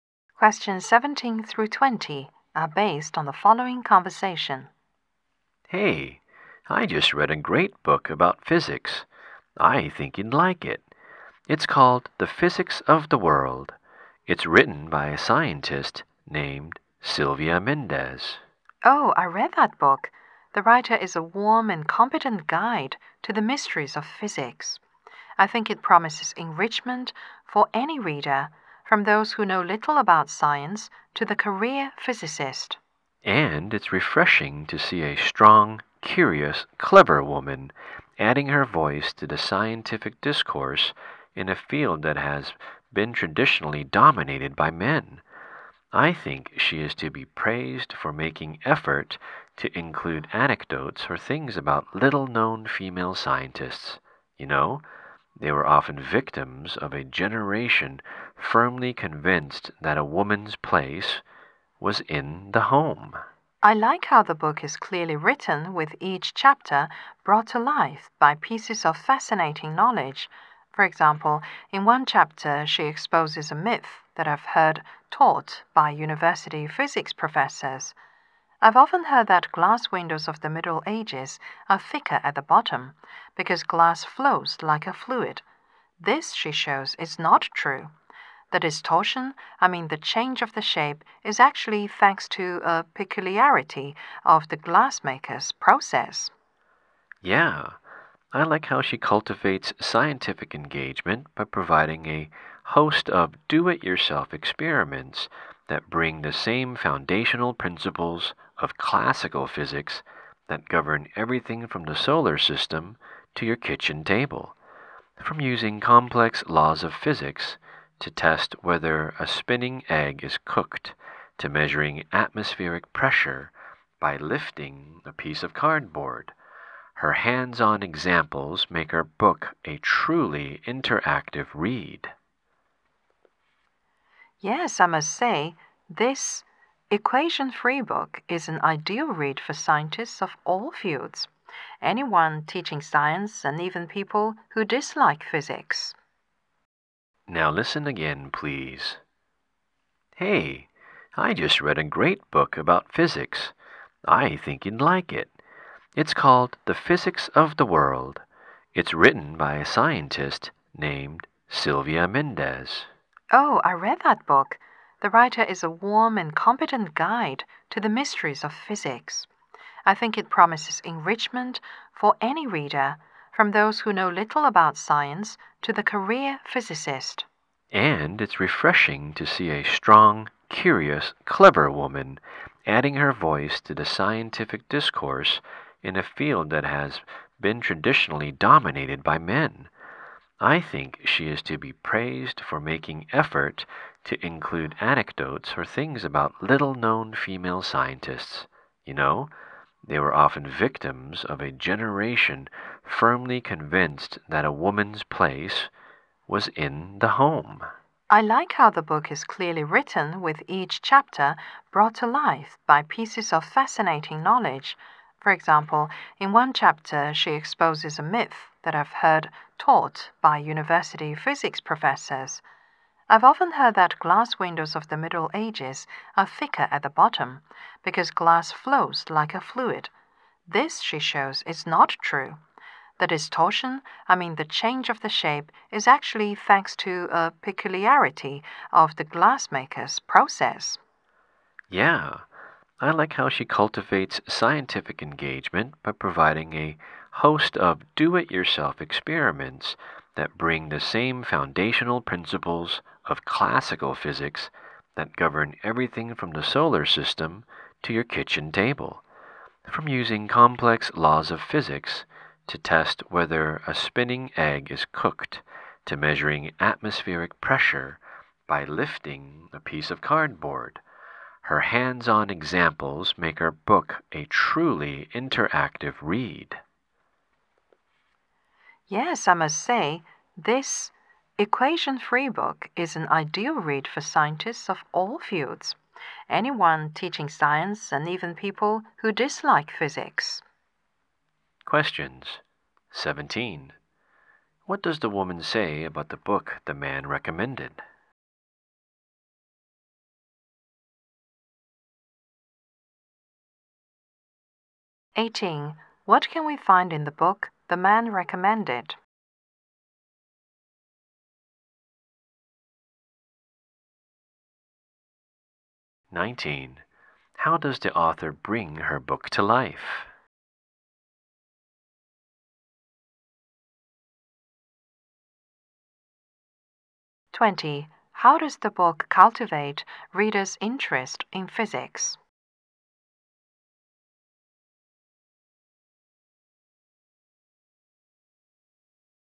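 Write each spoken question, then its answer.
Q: How does the author bring her book to life?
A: With pieces of fascinating knowledge in each chapter

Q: How does the book cultivate readers' interest in physics?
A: By giving many do-it-yourself experiments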